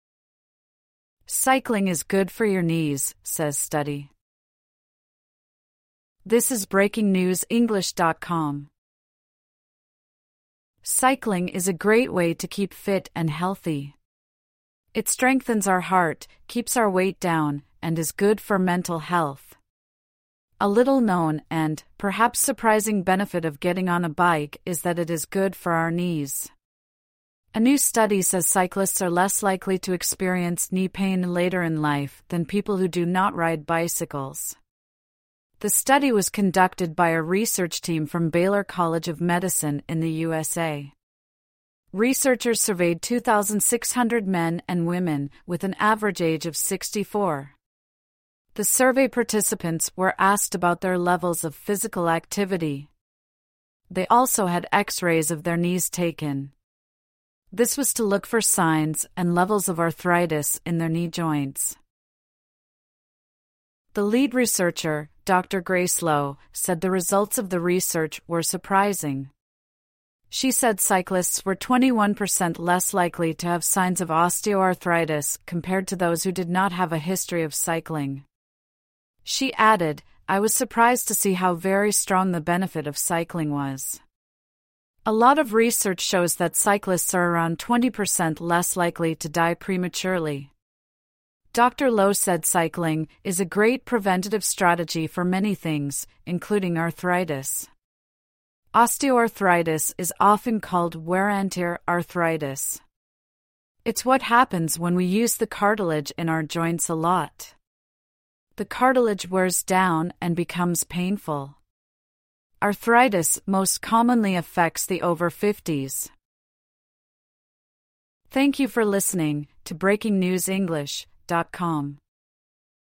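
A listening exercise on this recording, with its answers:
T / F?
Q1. The article says cycling helps to keep out weight up.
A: F

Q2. The article suggested it is surprising that cycling is good for the knees.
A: T

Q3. Over 2,600 men were questioned as part of the research.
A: F

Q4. Researchers took X-rays of people's hips and ankles.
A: F

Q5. Cyclists are 21% less likely to have signs of osteoarthritis.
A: T

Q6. Cyclists are 20% less likely to die too early.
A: T

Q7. Another name for osteoarthritis "wear-andtear" arthritis.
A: T

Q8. Arthritis usually starts to affect people in their fifties.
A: T

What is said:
Cycling is good for your knees, says study
Cycling is a great way to keep fit and healthy. It strengthens our heart, keeps our weight down, and is good for mental health. A little-known and (perhaps) surprising benefit of getting on a bike is that it is good for our knees. A new study says cyclists are less likely to experience knee pain later in life than people who do not ride bicycles. 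The study was conducted by a research team from Baylor College of Medicine in the USA. Researchers surveyed 2,600 men and women, with an average age of 64. The survey participants were asked about their levels of physical activity. They also had X-rays of their knees taken. This was to look for signs and levels of arthritis in their knee joints.
The lead researcher, Dr Grace Lo, said the results of the research were surprising. She said cyclists were 21 per cent less likely to have signs of osteoarthritis compared to those who did not have a history of cycling. She added: "I was surprised to see how very strong the benefit [of cycling] was." A lot of research shows that cyclists are around 20 per cent less likely to die prematurely. Dr Lo said cycling, "is a great preventative strategy for many things, including arthritis". Osteoarthritis is often called "wear-and-tear" arthritis. It's what happens when we use the cartilage in our joints a lot. 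The cartilage wears down and becomes painful. Arthritis most commonly affects the over-50s.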